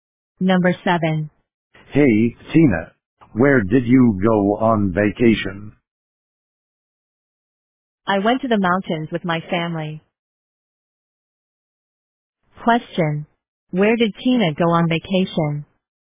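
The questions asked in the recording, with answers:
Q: Where did Tina go on vacation?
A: To the mountains.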